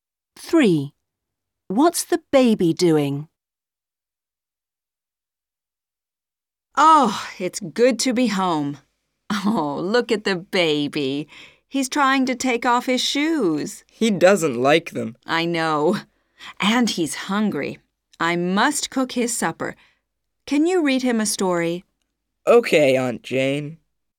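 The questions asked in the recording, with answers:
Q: What's the baby doing?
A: Trying to take off his shoes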